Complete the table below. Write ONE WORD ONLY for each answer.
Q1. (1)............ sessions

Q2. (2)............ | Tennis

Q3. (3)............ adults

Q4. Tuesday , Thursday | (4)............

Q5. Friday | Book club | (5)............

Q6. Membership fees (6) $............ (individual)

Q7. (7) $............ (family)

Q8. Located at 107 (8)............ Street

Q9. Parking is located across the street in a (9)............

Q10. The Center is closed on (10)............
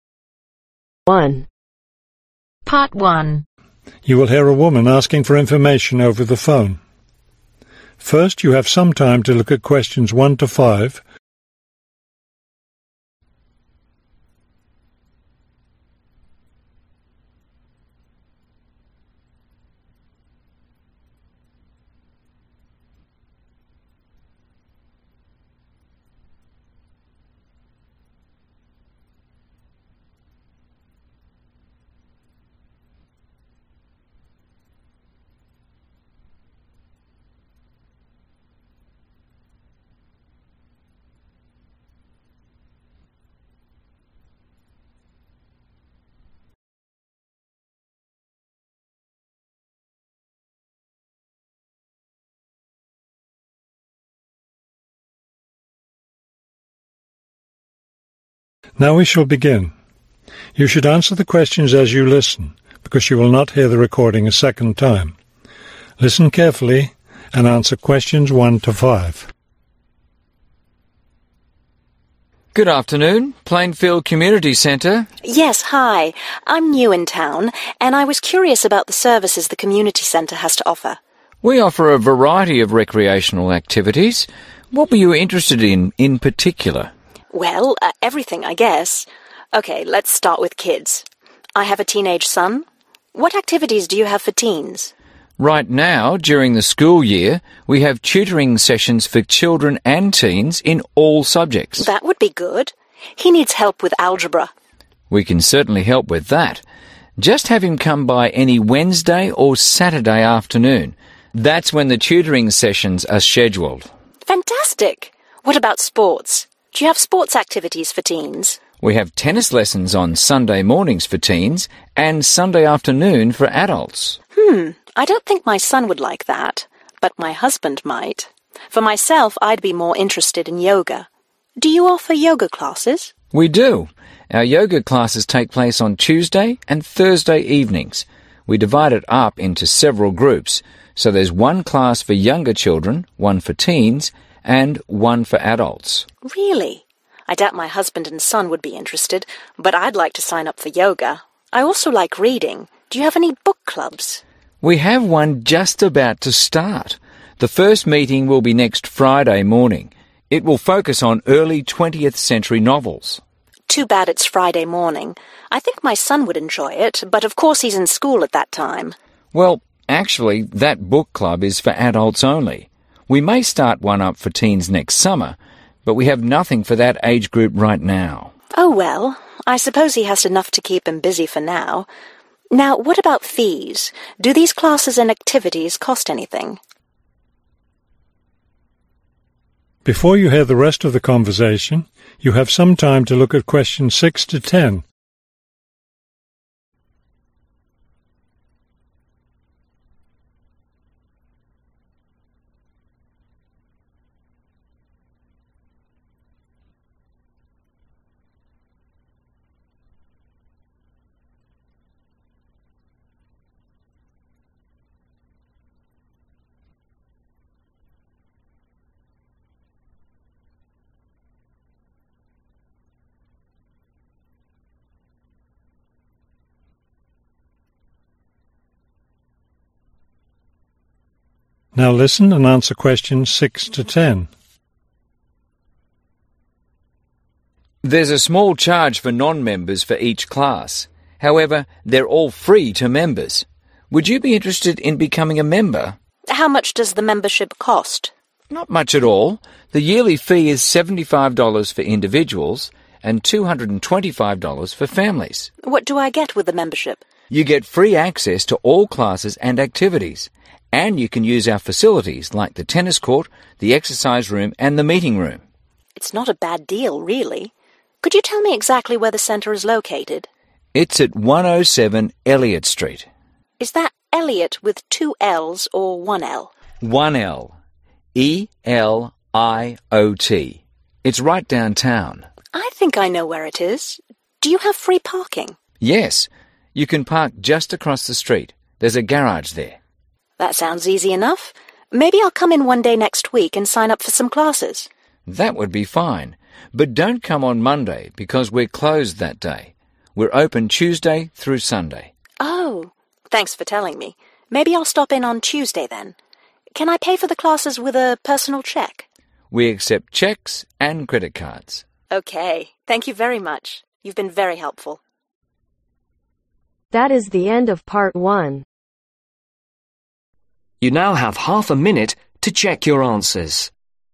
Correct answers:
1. Tutoring
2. Sunday
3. Teens
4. Yoga
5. Adults
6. 75
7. 225
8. Eliot
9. Garage
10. Monday